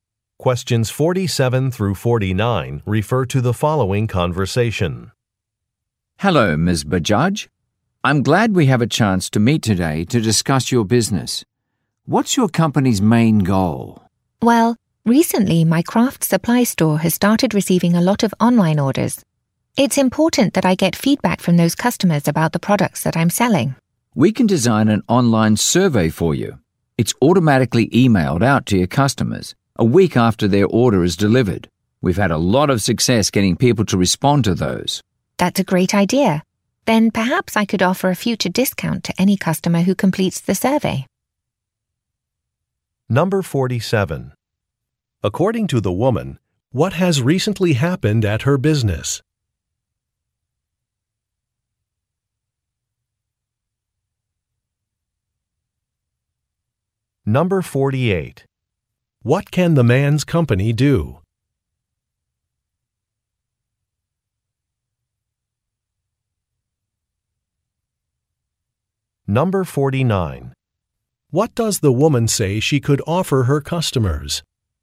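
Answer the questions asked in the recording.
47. It has received many online orders
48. Design an online survey
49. A future discount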